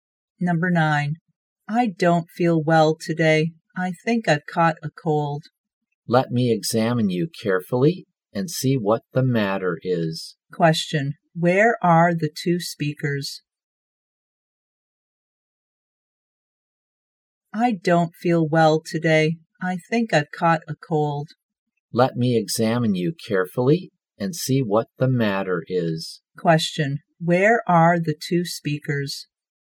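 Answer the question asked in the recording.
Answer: In a hospital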